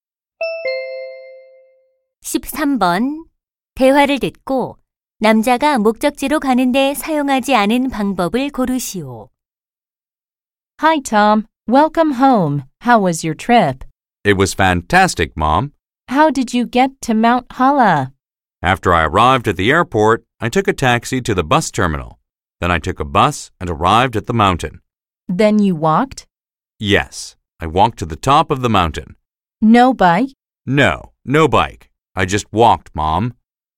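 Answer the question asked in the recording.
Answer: 자전거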